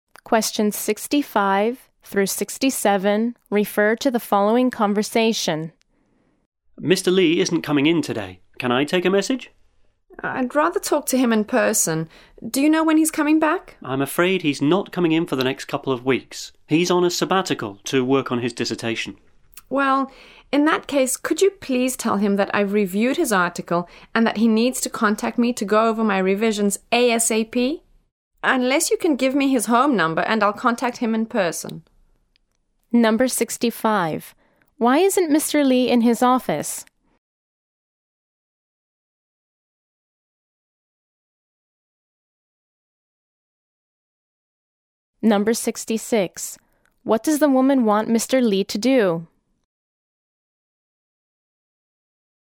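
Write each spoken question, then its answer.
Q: Why isn't Mr. Lee in his office?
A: He is on a sabbatical to work on his dissertation.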